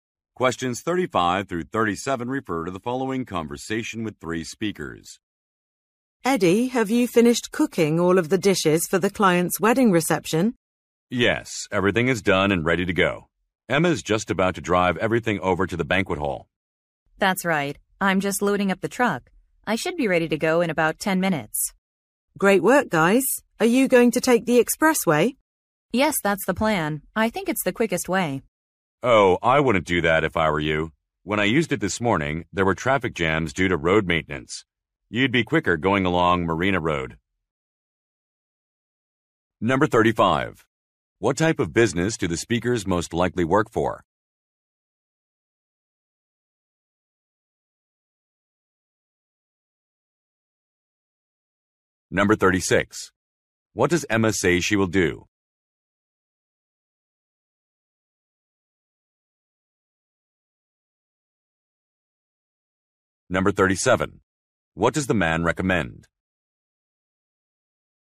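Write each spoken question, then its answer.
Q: What type of business do the speakers most likely work for?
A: A catering company

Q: What does Emma say she will do?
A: Drive the food to the banquet hall

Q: What does the man recommend?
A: Taking Marina Road instead of the expressway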